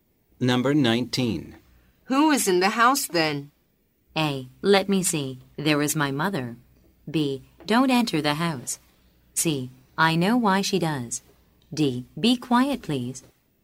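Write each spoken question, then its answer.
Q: Who is in the house then?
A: A: Let me see. There is my mother.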